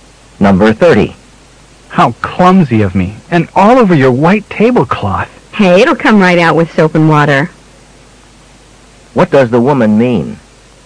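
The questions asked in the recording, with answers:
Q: What does the woman mean?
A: The stain will wash out easily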